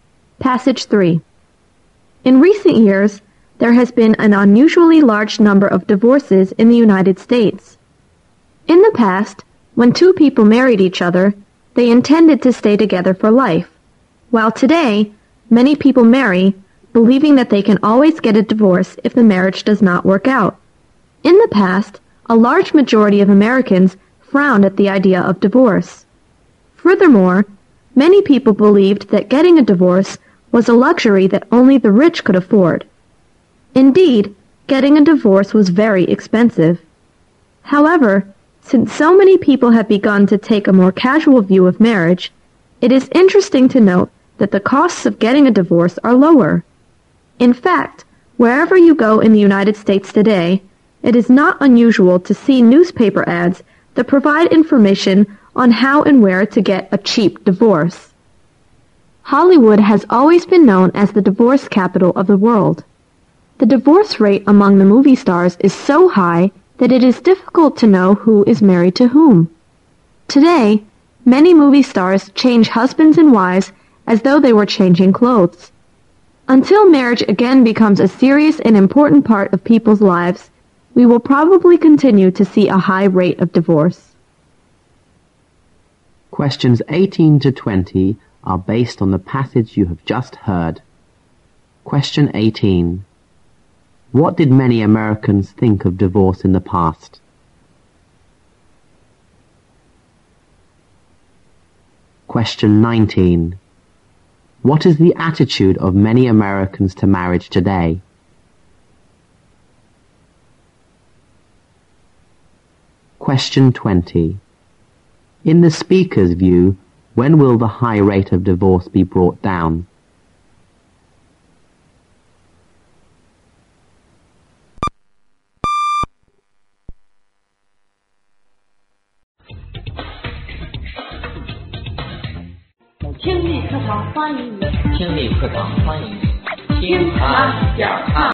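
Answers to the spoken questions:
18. They disapproved of it and saw it as a luxury only the rich could afford.
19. They take a casual view of it.
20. When marriage again becomes a serious and important part of people's lives.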